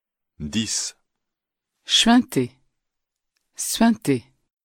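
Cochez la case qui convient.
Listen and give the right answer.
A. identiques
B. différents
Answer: B. différents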